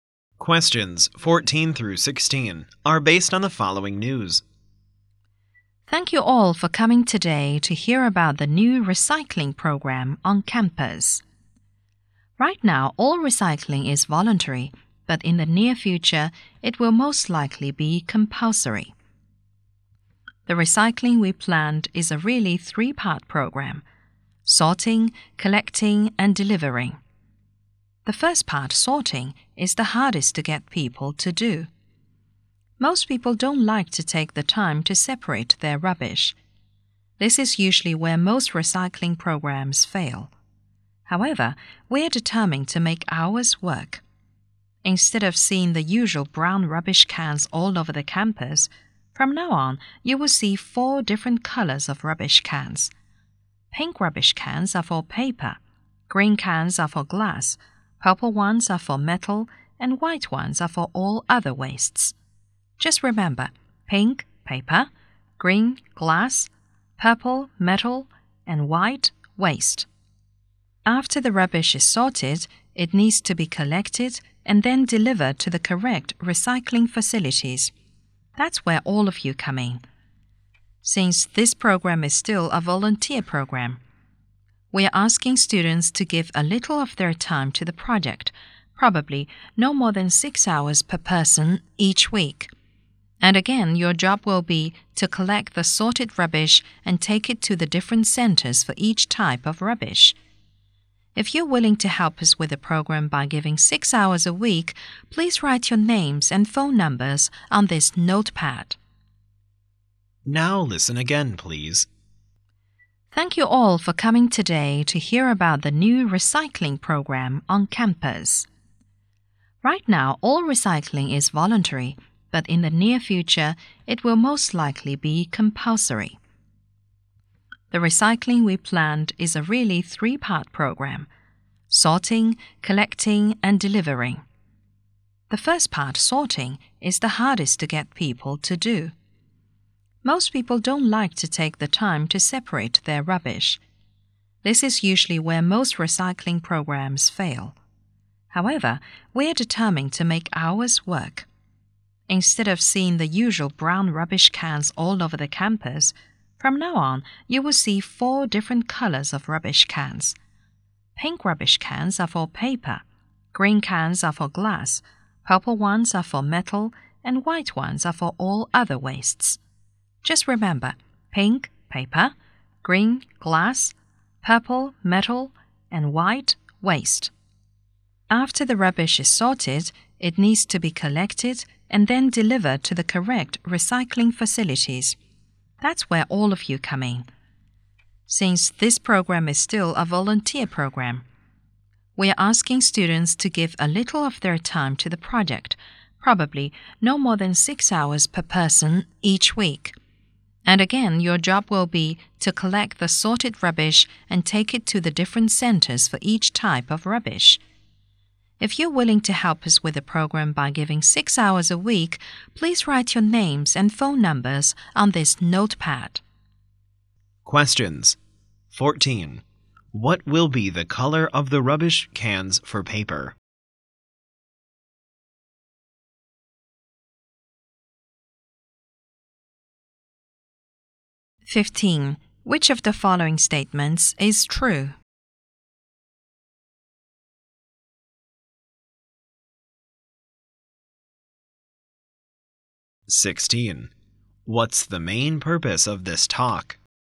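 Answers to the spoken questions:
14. Pink
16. To introduce the new recycling program and ask for student volunteers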